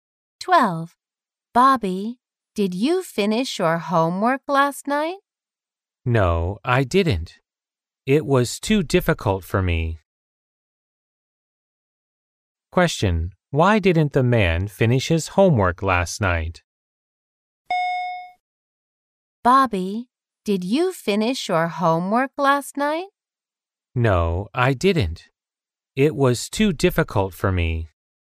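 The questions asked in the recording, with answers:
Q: Why didn't the man finish his homework last night?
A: It was too difficult for him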